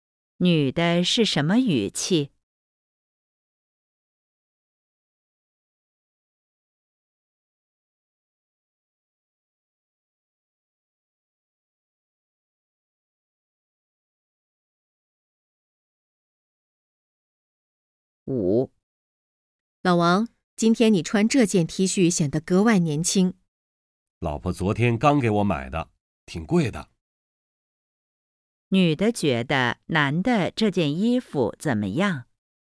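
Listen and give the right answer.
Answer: 穿着显得格外年轻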